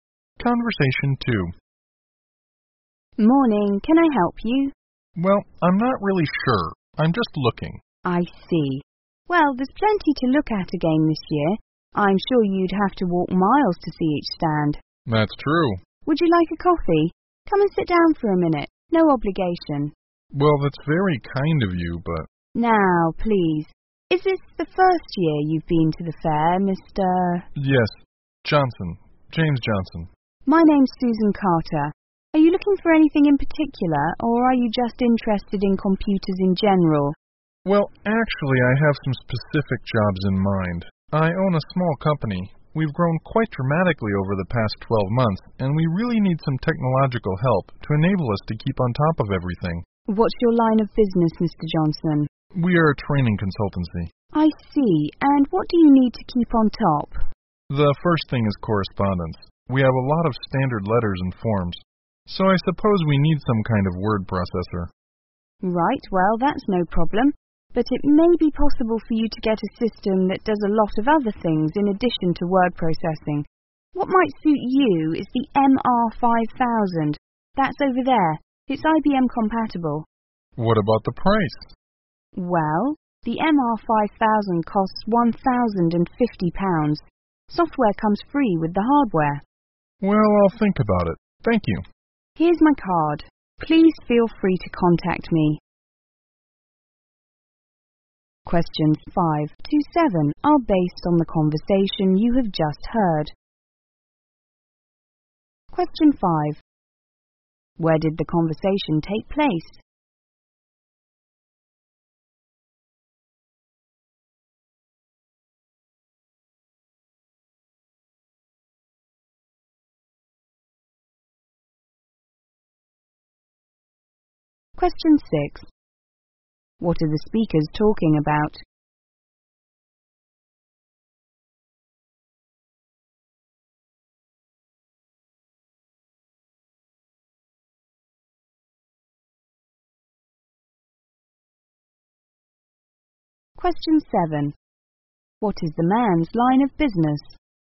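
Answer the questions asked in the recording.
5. At a computer fair
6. Buying a computer system for the man's company
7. A training consultancy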